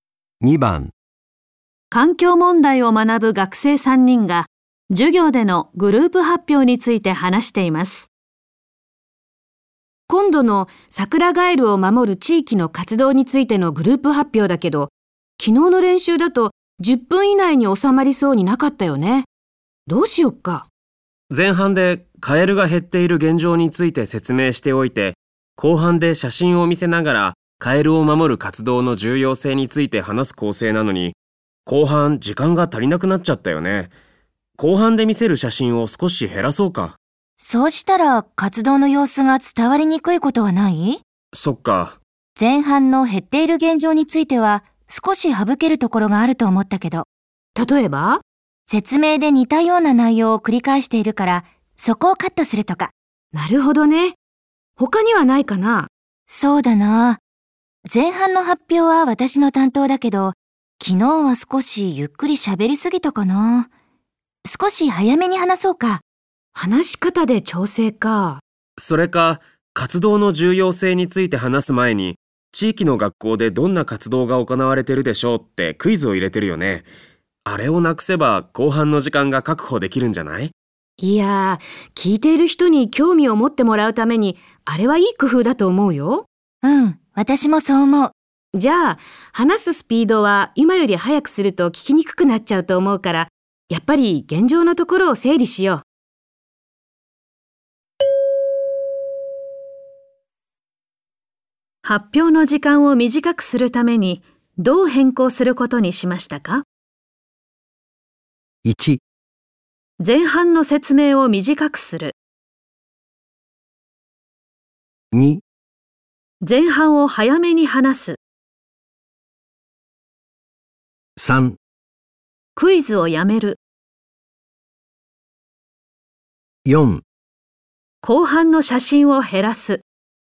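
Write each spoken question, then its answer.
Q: 発表の時間を短くするためにどう変更することにしましたか?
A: 1: 前半の説明を短くする。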